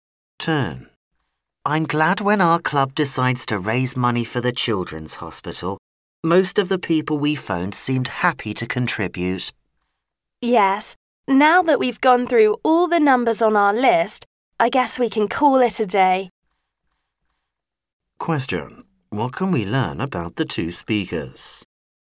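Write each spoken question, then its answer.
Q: What can we learn about the two speakers?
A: They have finished their calls to raise money for the hospital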